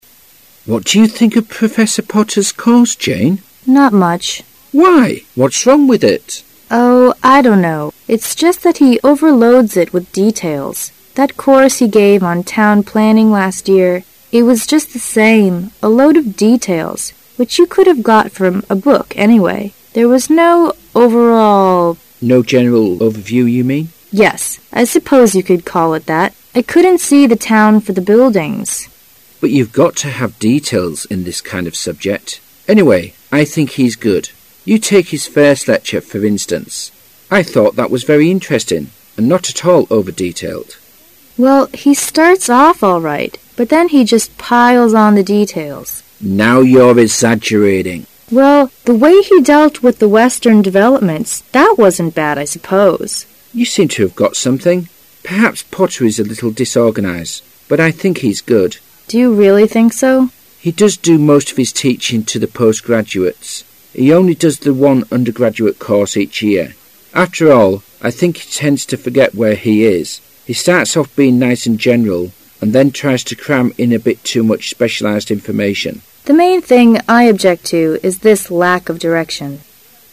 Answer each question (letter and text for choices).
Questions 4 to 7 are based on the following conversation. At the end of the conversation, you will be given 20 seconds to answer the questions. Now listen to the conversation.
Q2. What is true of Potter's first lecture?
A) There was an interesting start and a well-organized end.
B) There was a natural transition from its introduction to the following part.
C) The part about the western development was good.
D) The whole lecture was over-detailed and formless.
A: C) The part about the western development was good.

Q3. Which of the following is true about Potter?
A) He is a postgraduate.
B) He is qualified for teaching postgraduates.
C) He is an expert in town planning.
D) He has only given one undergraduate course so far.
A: B) He is qualified for teaching postgraduates.

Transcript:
[解析] 4-7 Harry: What do you think of Professor Potter's course, Jane? Jane: Not much. Harry: Why, what's wrong with it? Jane: Oh, I don't know. It's just that he overloads it with details. That course he gave on town planning last year. It was just the same -- a load of details, which you could have got from a book anyway. There was no overall... Harry: No general overview you mean? Jane: Yes. I suppose you could call it that. I couldn't see the town for the buildings. Harry: But you' ve got to have details in this kind of subject. Anyway I think he's good. You take his first lecture for in stance. I thought that was very interesting, and not at all over-detailed. Jane: Well, he starts off all right, but then he just piles on the details. Harry: Now you' re exaggerating. Jane: Well, the way he dealt with the western developments, that wasn't bad, I suppose. Harry: You seem to have got something. Perhaps Potter is a little disorganized, but I think he's good. Jane: Do you really think so? Harry: He does do most of his teaching to the postgraduates. He only does the one undergraduate course each year. After all, I think he tends to forget where he is. He starts off being nice and general and then tries to cram in a bit toe much specialized information. Jane: The main thing I object to is this lack of direction.